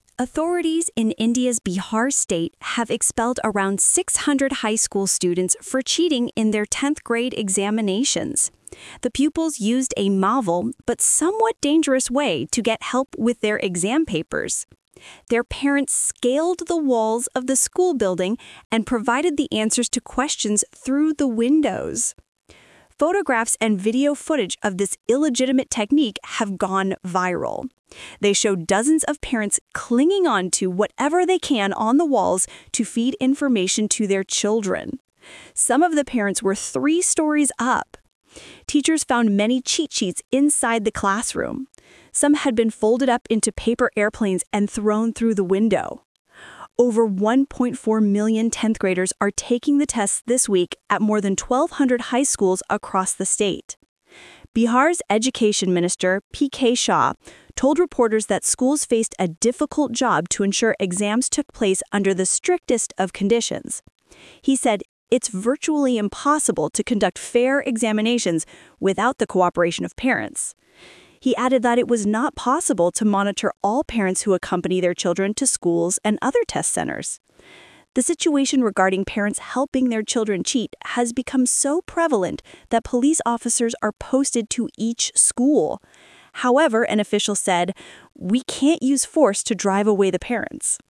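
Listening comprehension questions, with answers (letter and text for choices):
Talk/Lecture 2: Listen to a talk about students' cheating.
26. How many students have been dislodged for their fault?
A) 10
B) 14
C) 600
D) 60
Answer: C) 600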